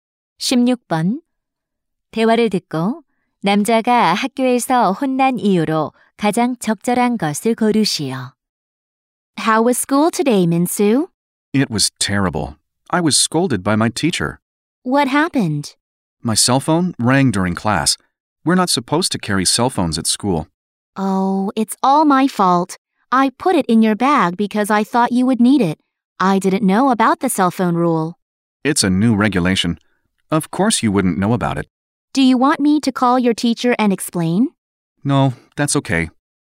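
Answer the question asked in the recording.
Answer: 수업 중에 휴대폰이 울려서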